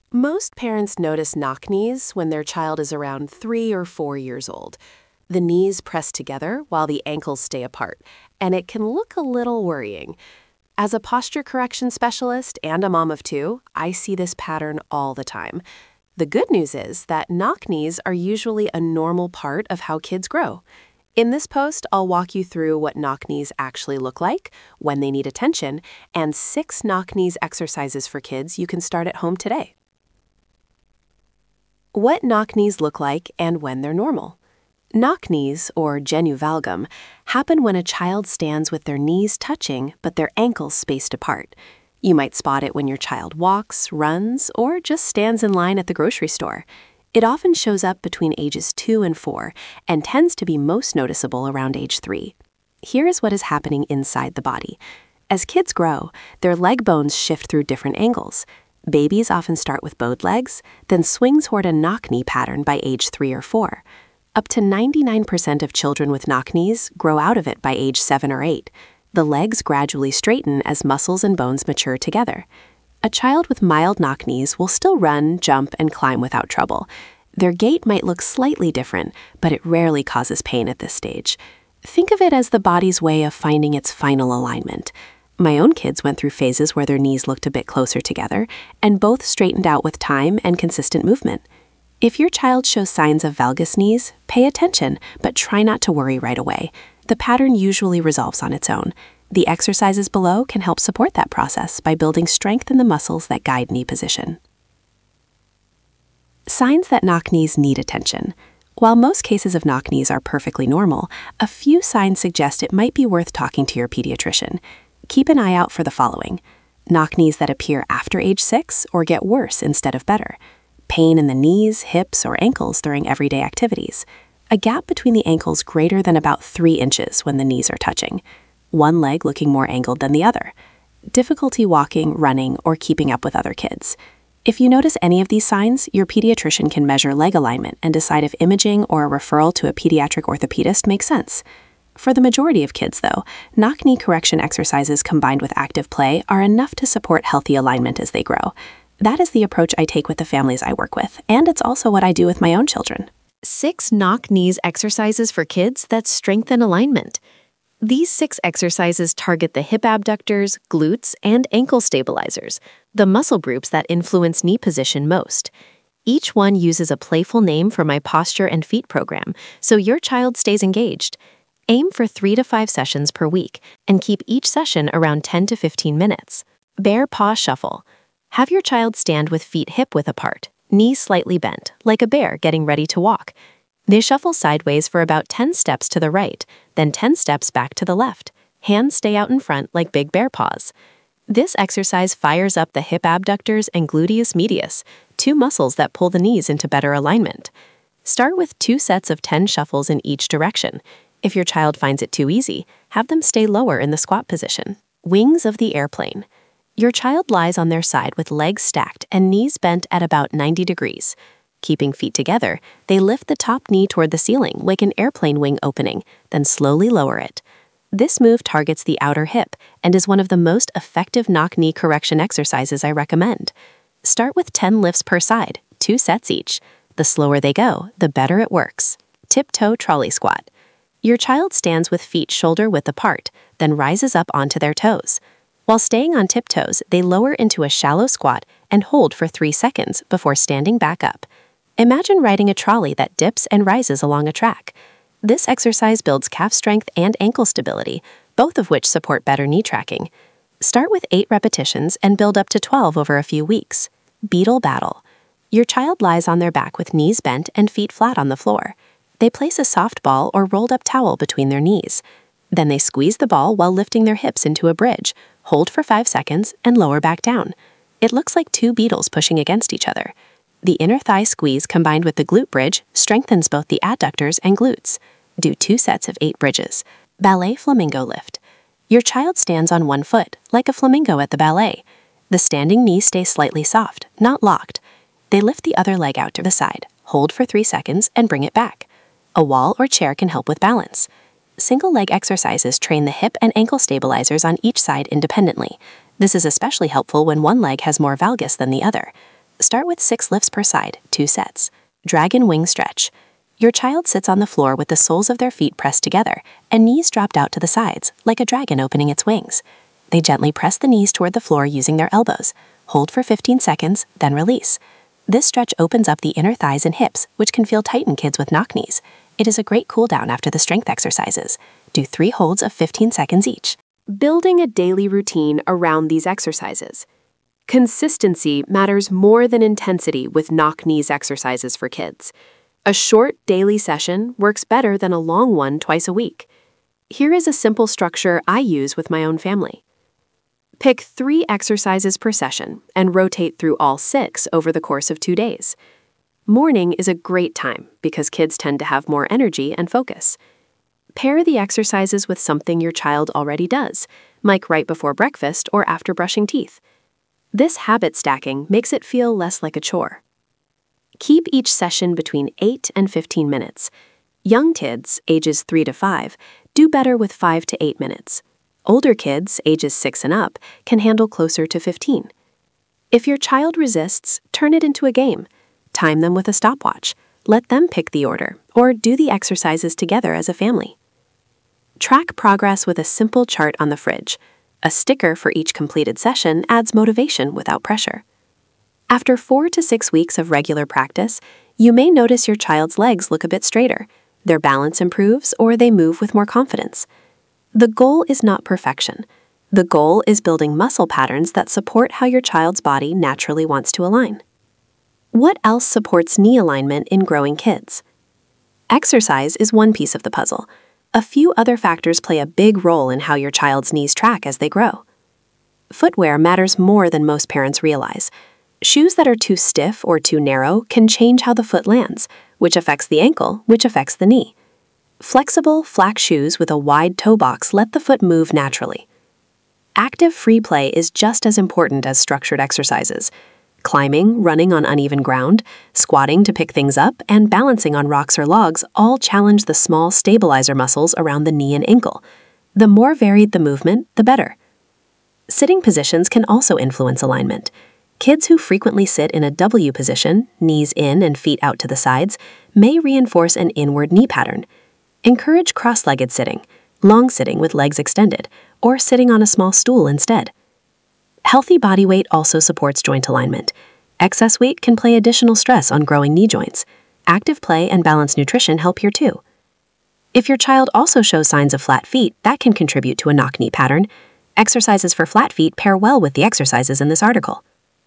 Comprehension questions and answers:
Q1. At what age do knock knees typically become most noticeable?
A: 3 to 4 years

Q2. What percentage of children with knock knees outgrow the condition naturally?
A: Up to 99%

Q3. Which muscle group is most important for improving knock knee alignment?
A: Hip abductors and glutes

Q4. How long should a daily knock knees exercise session last for young kids?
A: 5 to 8 minutes

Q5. What type of footwear best supports natural knee alignment in children?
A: Flexible shoes with a wide toe box

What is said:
Most parents notice knock knees when their child is around three or four years old. The knees press together while the ankles stay apart, and it can look a little worrying. As a posture correction specialist and a mom of two, I see this pattern all the time. The good news is that knock knees are usually a normal part of how kids grow. In this post, I'll walk you through what knock knees actually look like, when they need attention, and six knock knees exercises for kids you can start at home today.
What Knock Knees Look Like (and When They're Normal)
Knock knees, or genu valgum, happen when a child stands with their knees touching but their ankles spaced apart. You might spot it when your child walks, runs, or just stands in line at the grocery store. It often shows up between ages two and four, and it tends to be most noticeable around age three.
Here is what is happening inside the body. As kids grow, their leg bones shift through different angles. Babies often start with bowed legs, then swing toward a knock knee pattern by age three or four. According to the Nemours KidsHealth resource on knock knees, up to 99 percent of children with knock knees grow out of it by age seven or eight. The legs gradually straighten as muscles and bones mature together.
A child with mild knock knees will still run, jump, and climb without trouble. Their gait might look slightly different, but it rarely causes pain at this stage. Think of it as the body's way of finding its final alignment. My own kids went through phases where their knees looked a bit closer together, and both straightened out with time and consistent movement.
If your child shows signs of valgus knees, pay attention but try not to worry right away. The pattern usually resolves on its own. The exercises below can help support that process by building strength in the muscles that guide knee position.
Signs That Knock Knees Need Attention
While most cases of knock knees are perfectly normal, a few signs suggest it might be worth talking to your pediatrician. Keep an eye out for the following.
Knock knees that appear after age six or get worse instead of better
Pain in the knees, hips, or ankles during everyday activities
A gap between the ankles greater than about three inches (roughly 8 centimeters) when the knees are touching
One leg looking more angled than the other (asymmetry)
Difficulty walking, running, or keeping up with other kids
If you notice any of these signs, your pediatrician can measure leg alignment and decide if imaging or a referral to a pediatric orthopedist makes sense.
For the majority of kids, though, knock knee correction exercises combined with active play are enough to support healthy alignment as they grow. That is the approach I take with the families I work with, and it is also what I do with my own children.
These six exercises target the hip abductors, glutes, and ankle stabilizers, the muscle groups that influence knee position most. Each one uses a playful name from my Posture and Feet course so your child stays engaged. Aim for three to five sessions per week, and keep each session around ten to fifteen minutes.
Have your child stand with feet hip-width apart, knees slightly bent, like a bear getting ready to walk. They shuffle sideways for about ten steps to the right, then ten steps back to the left. Hands stay out in front like big bear paws.
This exercise fires up the hip abductors and gluteus medius, two muscles that pull the knees into better alignment. Start with two sets of ten shuffles in each direction. If your child finds it too easy, have them stay lower in the squat position.
The Towel Scrunch targets hip abductors that support knee alignment
Single-Leg Balance Hold
Your child lies on their side with legs stacked and knees bent at about 90 degrees. Keeping feet together, they lift the top knee toward the ceiling like an airplane wing opening, then slowly lower it. You can learn the full version of this exercise on the Single-Leg Balance Hold page.
This move targets the outer hip and is one of the most effective knock knee correction exercises I recommend. Start with ten lifts per side, two sets each. The slower they go, the better it works.
Your child stands with feet shoulder-width apart, then rises up onto their toes. While staying on tiptoes, they lower into a shallow squat and hold for three seconds before standing back up. Imagine riding a trolley that dips and rises along a track.
This exercise builds calf strength and ankle stability, both of which support better knee tracking. Start with eight repetitions and build up to twelve over a few weeks. If balance is tricky at first, let them hold a wall or chair.
The Heel Raise with Mini Squat builds ankle stability and calf strength
Bridge Hold
Your child lies on their back with knees bent and feet flat on the floor. They place a soft ball or rolled-up towel between their knees. Then they squeeze the ball while lifting their hips into a bridge, hold for five seconds, and lower back down. It looks like two beetles pushing against each other.
The inner thigh squeeze combined with the glute bridge strengthens both the adductors and glutes. This balance of inner and outer leg muscles matters a lot for how to fix knock knees in children over time. Do two sets of eight bridges.
Standing Knee Lift
Your child stands on one foot, like a flamingo at the ballet. The standing knee stays slightly soft (not locked). They lift the other leg out to the side, hold for three seconds, and bring it back. A wall or chair can help with balance.
Single-leg exercises train the hip and ankle stabilizers on each side independently. This is especially helpful when one leg has more valgus than the other. Start with six lifts per side, two sets. As balance improves, try it without holding anything.
Side Lunge Stretch
Your child sits on the floor with the soles of their feet pressed together and knees dropped out to the sides, like a dragon opening its wings. They gently press the knees toward the floor using their elbows, hold for fifteen seconds, then release.
This stretch opens up the inner thighs and hips, which can feel tight in kids with knock knees. It is a great cool-down after the strength exercises. Do three holds of fifteen seconds each. Remind your child to keep their back straight and breathe slowly.
For video-guided versions of all six exercises, my Posture and Feet course walks you through each one step by step with demonstrations your child can follow along with.
Building a Daily Routine Around These Exercises
Consistency matters more than intensity with knock knees exercises for kids. A short daily session works better than a long one twice a week. Here is a simple structure I use with my own family.
Pick three exercises per session and rotate through all six over the course of two days. Morning is a great time because kids tend to have more energy and focus. Pair the exercises with something your child already does, like right before breakfast or after brushing teeth. This habit stacking makes it feel less like a chore.
Keep each session between eight and fifteen minutes. Young kids (ages three to five) do better with five to eight minutes. Older kids (ages six and up) can handle closer to fifteen. If your child resists, turn it into a game. Time them with a stopwatch, let them pick the order, or do the exercises together as a family.
Track progress with a simple chart on the fridge. A sticker for each completed session adds motivation without pressure. After four to six weeks of regular practice, you may notice your child's legs look a bit straighter, their balance improves, or they move with more confidence.
The goal is not perfection. The goal is building muscle patterns that support how your child's body naturally wants to align. These exercises work best as a steady, low-pressure habit.
What Else Supports Knee Alignment in Growing Kids
Exercise is one piece of the puzzle. A few other factors play a big role in how your child's knees track as they grow.
Footwear matters more than most parents realize. Shoes that are too stiff or too narrow can change how the foot lands, which affects the ankle, which affects the knee. Flexible, flat shoes with a wide toe box let the foot move naturally. I cover this in detail in my Ultimate Footwear Guide for kids.
Active free play is just as important as structured exercises. Climbing, running on uneven ground, squatting to pick things up, and balancing on rocks or logs all challenge the small stabilizer muscles around the knee and ankle. The more varied the movement, the better.
Sitting positions can also influence alignment. Kids who frequently sit in a W position (knees in, feet out to the sides) may reinforce an inward knee pattern. Encourage cross-legged sitting, long sitting with legs extended, or sitting on a small stool instead.
Healthy body weight also supports joint alignment. According to Boston Children's Hospital, excess weight can place additional stress on growing knee joints and may contribute to valgus knees in children. Active play and balanced nutrition help here too.
If your child also shows signs of flat feet, that can contribute to a knock knee pattern.